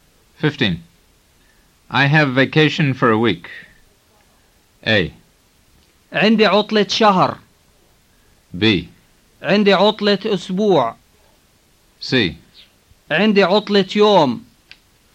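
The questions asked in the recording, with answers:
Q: I have vacation for a week.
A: B: عندي عطلة أسبوع.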